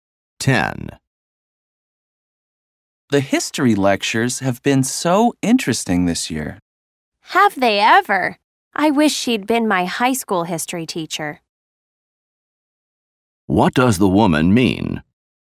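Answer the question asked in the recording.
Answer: She agrees the lectures have been very interesting.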